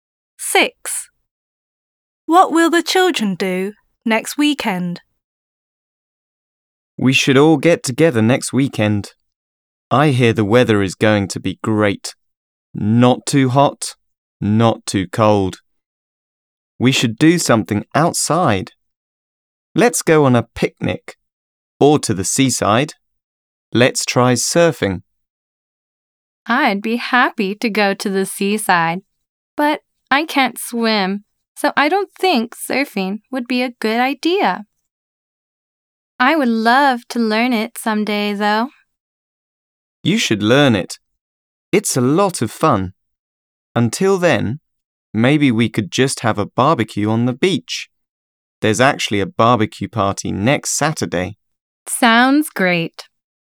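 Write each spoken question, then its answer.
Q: What will the children do next weekend?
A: Have a barbecue on the beach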